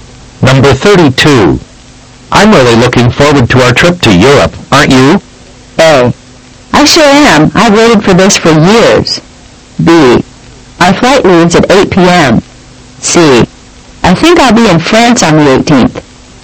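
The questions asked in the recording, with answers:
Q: I'm really looking forward to our trip to Europe, aren't you?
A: A: I sure am. I've waited for this for years.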